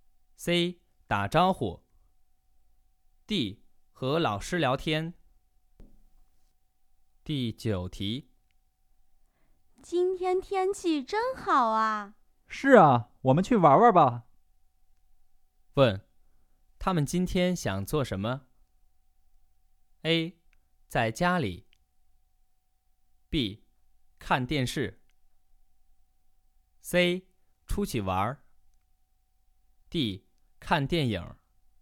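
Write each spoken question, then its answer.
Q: 问,他们今天想做什么?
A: C: 出去玩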